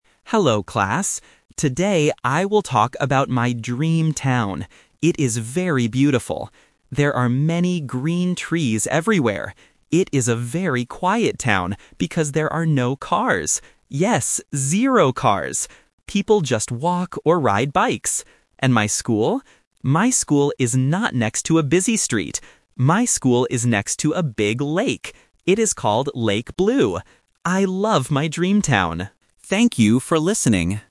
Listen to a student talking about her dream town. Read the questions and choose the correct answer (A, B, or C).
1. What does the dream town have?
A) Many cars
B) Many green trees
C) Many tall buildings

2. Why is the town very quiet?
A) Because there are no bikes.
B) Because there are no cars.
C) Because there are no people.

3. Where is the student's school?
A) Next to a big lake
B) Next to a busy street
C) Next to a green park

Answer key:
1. B
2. B
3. A

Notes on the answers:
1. The student clearly says, "There are many green trees everywhere." Why the traps are wrong: Option A is a trap because the word "cars" is mentioned, but the student says there are no cars. Option C is a plausible thing for a town to have, but it is never mentioned in the audio.
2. The student explicitly states, "It is a very quiet town because there are no cars." Why the traps are wrong: Option A is a trap because "bikes" are mentioned ("People just walk or ride bikes"), but they are not the reason the town is quiet. Option C is a plausible reason for a quiet place, but it is not mentioned.
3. The student says, "My school is next to a big lake." Why the traps are wrong: Option B is a trap because the student says, "My school is not next to a busy street." Option C introduces a place ("park") that is never mentioned in the presentation.

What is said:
Student: Hello, class. Today I will talk about my dream town. It is very beautiful. There are many green trees everywhere. It is a very quiet town because there are no cars. Yes, zero cars! People just walk or ride bikes. And my school? My school is not next to a busy street. My school is next to a big lake. It is called Lake Blue. I love my dream town. Thank you for listening.

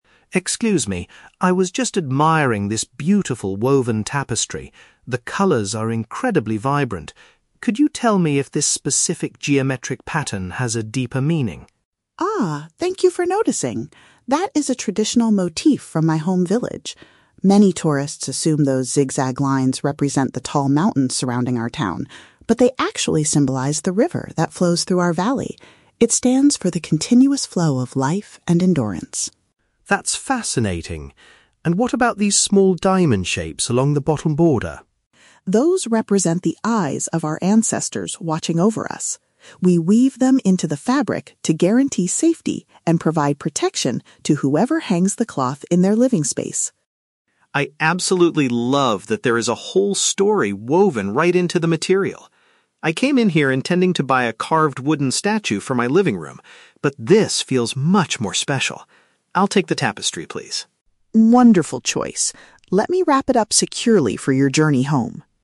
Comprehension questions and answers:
Listen to the conversation between a customer and an artisan. Choose the correct answer (A, B, or C) for each question.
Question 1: What do the zigzag lines on the woven fabric actually represent?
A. The mountain peaks near the artisan's hometown.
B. The water current running through the local valley.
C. The difficult journey of the village ancestors.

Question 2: According to Elena, what is the purpose of the diamond shapes in the design?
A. To ensure the security and well-being of the household.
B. To make the borders of the tapestry look more colorful.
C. To honor the faces of the current village leaders.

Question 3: How does Mark's shopping plan change by the end of the conversation?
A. He decides to purchase a wooden sculpture instead of the cloth.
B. He chooses to buy the tapestry because of its rich symbolic meaning.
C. He asks the artisan to weave a new piece with a different pattern.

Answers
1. B
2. A
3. B

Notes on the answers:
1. Elena says the zigzag lines "symbolize the river that flows through our valley" (the water current running through the valley). Option (A) is a trap; she mentions that many tourists assume they represent the mountains, but that is incorrect. Option (C) is a trap using the word "ancestors", which is mentioned later for a different shape.
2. Elena explains that the diamond shapes are woven to "guarantee safety and provide protection to whoever hangs the cloth" (ensure the security and well-being of the household). Option (C) is a trap; the shapes represent the eyes of the ancestors, not the faces of current leaders. Option (B) is a plausible aesthetic reason but not the symbolic meaning she shares.
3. Mark says he loves that there is a "story woven right into the material" and decides "I'll take the tapestry" because it feels "much more special." Option (A) is a trap; he originally intended to buy a carved wooden statue, but he changed his mind and bought the tapestry instead. Option (C) is never mentioned.

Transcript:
Mark: Excuse me, I was just admiring this beautiful woven tapestry. The colors are incredibly vibrant. Could you tell me if this specific geometric pattern has a deeper meaning?
Elena: Ah, thank you for noticing! That is a traditional motif from my home village. Many tourists assume those zigzag lines represent the tall mountains surrounding our town, but they actually symbolize the river that flows through our valley. It stands for the continuous flow of life and endurance.
Mark: That's fascinating. And what about these small diamond shapes along the bottom border?
Elena: Those represent the eyes of our ancestors watching over us. We weave them into the fabric to guarantee safety and provide protection to whoever hangs the cloth in their living space.
Mark: I absolutely love that there is a whole story woven right into the material. I came in here intending to buy a carved wooden statue for my living room, but this feels much more special. I'll take the tapestry, please.
Elena: Wonderful choice. Let me wrap it up securely for your journey home.

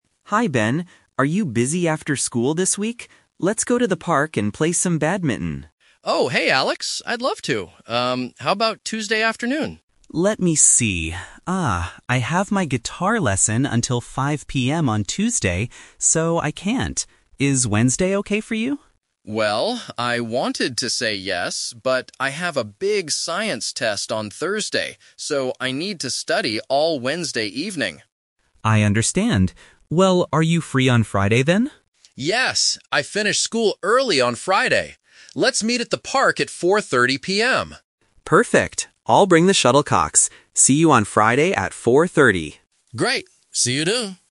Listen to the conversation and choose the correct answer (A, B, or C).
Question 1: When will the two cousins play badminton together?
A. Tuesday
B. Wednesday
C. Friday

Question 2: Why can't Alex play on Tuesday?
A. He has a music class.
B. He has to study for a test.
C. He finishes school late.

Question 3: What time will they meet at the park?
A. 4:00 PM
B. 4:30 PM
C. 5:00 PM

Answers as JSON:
{"1": "C", "2": "A", "3": "B"}

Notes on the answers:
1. They finally agree to meet on Friday because Alex is busy on Tuesday and Ben is busy on Wednesday. Options (A) and (B) are traps because they were mentioned but rejected.
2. Alex says he has a "guitar lesson" on Tuesday. A guitar lesson is a type of music class. Option (B) is a trap because studying for a test is Ben's reason for Wednesday, not Alex's reason for Tuesday.
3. Ben suggests meeting at 4:30 PM on Friday and Alex agrees. Option (C) is a trap because 5:00 PM is when Alex finishes his guitar lesson on Tuesday. Option (A) is not mentioned.

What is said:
Alex: Hi Ben! Are you busy after school this week? Let's go to the park and play some badminton.
Ben: Oh, hey Alex! I'd love to. Um, how about Tuesday afternoon?
Alex: Let me see... ah, I have my guitar lesson until 5:00 PM on Tuesday, so I can't. Is Wednesday okay for you?
Ben: Well, I wanted to say yes, but I have a big science test on Thursday, so I need to study all Wednesday evening.
Alex: I understand. Well, are you free on Friday then?
Ben: Yes! I finish school early on Friday. Let's meet at the park at 4:30 PM.
Alex: Perfect! I'll bring the shuttlecocks. See you on Friday at 4:30!

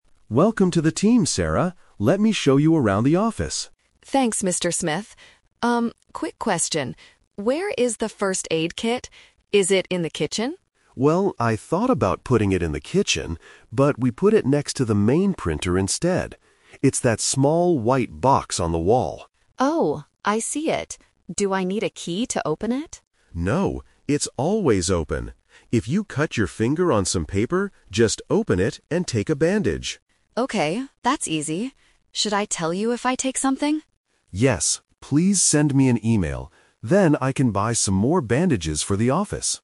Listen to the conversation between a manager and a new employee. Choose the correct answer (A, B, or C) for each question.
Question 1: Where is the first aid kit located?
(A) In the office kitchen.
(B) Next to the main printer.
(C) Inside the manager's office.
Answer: B

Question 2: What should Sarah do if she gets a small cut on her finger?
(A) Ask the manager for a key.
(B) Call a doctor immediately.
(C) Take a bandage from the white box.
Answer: C

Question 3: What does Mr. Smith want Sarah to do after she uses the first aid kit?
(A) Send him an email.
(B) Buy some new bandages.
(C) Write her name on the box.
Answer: A

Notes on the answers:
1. Mr. Smith clearly states, "we put it next to the main printer instead." Trap A is wrong (The Twist): Sarah asks if it is in the kitchen, and Mr. Smith says "I thought about putting it in the kitchen, but...". It was a past idea, not the real location. Trap C is wrong: The manager's office is a plausible place for a first aid kit, but it is not mentioned in the audio.
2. Mr. Smith says, "If you cut your finger on some paper, just open it and take a bandage." (The kit is the white box). Trap A is wrong: Sarah asks, "Do I need a key to open it?" and Mr. Smith answers "No, it's always open." Trap B is wrong: Calling a doctor is not mentioned, and it is unnecessary for a small paper cut.
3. Mr. Smith answers her question by saying, "Yes, please send me an email." Trap B is wrong: Sending an email helps Mr. Smith know when he needs to buy more bandages. Sarah doesn't have to buy them. Trap C is wrong: Writing her name is a plausible office rule, but it is never mentioned in the conversation.

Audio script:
Explanation: Mr.
Mr. Smith: Welcome to the team, Sarah. Let me show you around the office.
Sarah: Thanks, Mr. Smith. Um, quick question. Where is the first aid kit? Is it in the kitchen?
Mr. Smith: Well, I thought about putting it in the kitchen, but we put it next to the main printer instead. It's that small white box on the wall.
Sarah: Oh, I see it. Do I need a key to open it?
Mr. Smith: No, it's always open. If you cut your finger on some paper, just open it and take a bandage.
Sarah: Okay, that's easy. Should I tell you if I take something?
Mr. Smith: Yes, please send me an email. Then I can buy some more bandages for the office.

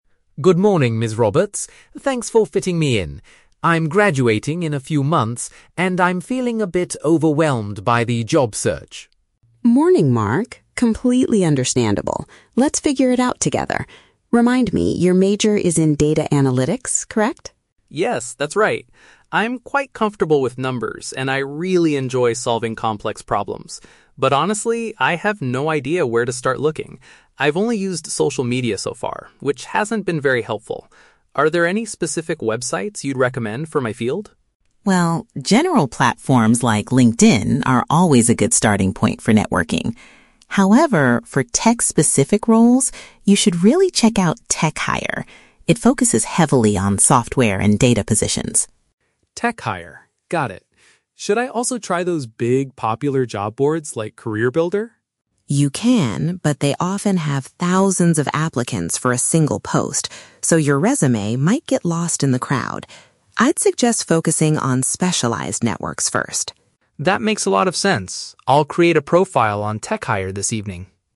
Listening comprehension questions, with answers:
Listen to the conversation between a university student and a career counselor. Choose the correct answer (A, B, or C) for each question.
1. What is Mark's primary reason for meeting with the counselor?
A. He wants to change his university major before graduation.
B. He needs guidance on where to find employment opportunities.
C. He is having trouble passing his Data Analytics exams.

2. What are Mark's main strengths according to the conversation?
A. He is good at working with statistics and finding solutions.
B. He has extensive experience using social media for business.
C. He is highly skilled at building new professional networks.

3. Why does the counselor advise against relying heavily on large, general job boards?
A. They charge high fees to create a professional profile.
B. They rarely post vacancies related to data and technology.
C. There is too much competition from other job seekers.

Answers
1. B
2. A
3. C

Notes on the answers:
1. Mark says he has "no idea where to start looking" and asks for "specific websites you'd recommend". Option (B) correctly paraphrases this as needing guidance to find employment opportunities. Option (A) is not mentioned. Option (C) is The Trap: "Data Analytics" is mentioned as his major, but he is not failing exams (he is actually good at it).
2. Mark states, "I'm quite comfortable with numbers, and I really enjoy solving complex problems." Option (A) uses synonyms (statistics = numbers; finding solutions = solving problems) to match his statement. Option (B) is The Trap: "Social media" is mentioned, but Mark says it "hasn't been very helpful" for his job search, not that he uses it for business. Option (C) is plausible but Ms. Roberts is the one who brings up networking, not Mark as a strength.
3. Ms. Roberts warns that big job boards have "thousands of applicants for a single post" and his resume might "get lost in the crowd". Option (C) paraphrases this situation as "too much competition". Option (A) is not mentioned. Option (B) is The Trap: She recommends "TechHire" for tech roles, but she never claims that big platforms do not post tech jobs, only that they are too crowded.

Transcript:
Mark: Good morning, Ms. Roberts. Thanks for fitting me in. I'm graduating in a few months, and I'm feeling a bit overwhelmed by the job search.
Ms. Roberts: Morning, Mark! Completely understandable. Let's figure it out together. Remind me, your major is in Data Analytics, correct?
Mark: Yes, that's right. I'm quite comfortable with numbers, and I really enjoy solving complex problems. But honestly, I have no idea where to start looking. I've only used social media so far, which hasn't been very helpful. Are there any specific websites you'd recommend for my field?
Ms. Roberts: Well, general platforms like LinkedIn are always a good starting point for networking. However, for tech-specific roles, you should really check out "TechHire". It focuses heavily on software and data positions.
Mark: TechHire... got it. Should I also try those big, popular job boards like CareerBuilder?
Ms. Roberts: You can, but they often have thousands of applicants for a single post, so your resume might get lost in the crowd. I'd suggest focusing on specialized networks first.

